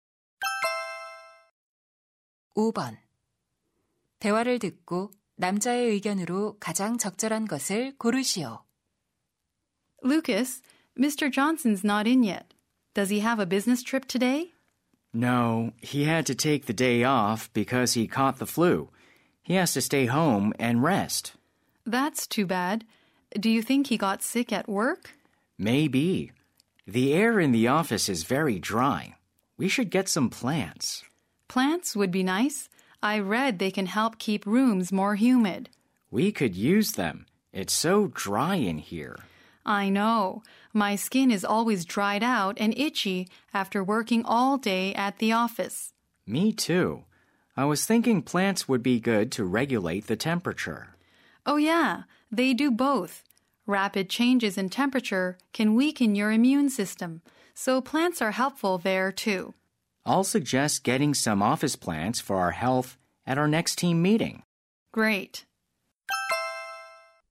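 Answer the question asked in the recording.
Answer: 사무실 식물은 직원 건강에 도움이 된다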